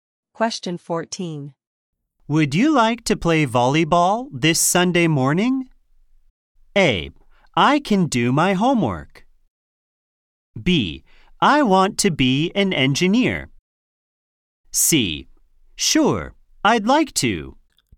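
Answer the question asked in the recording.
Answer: C: Sure, I'd like to.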